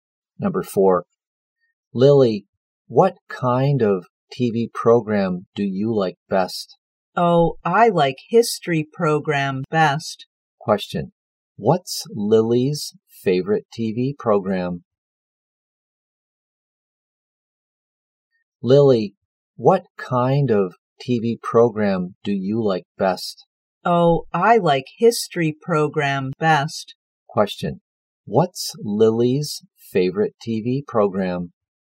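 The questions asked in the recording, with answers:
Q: What's Lily's favorite TV program?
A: History program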